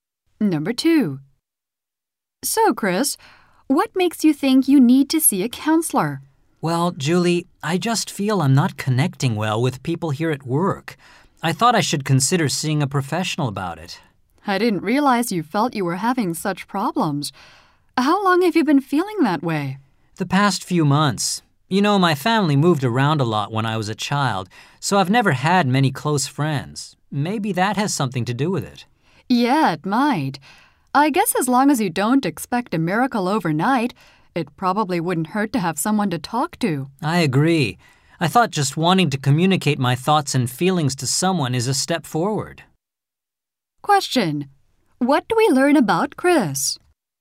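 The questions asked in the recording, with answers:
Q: What do we learn about Chris?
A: He feels he doesn't connect well with people at work and wants to see a counselor.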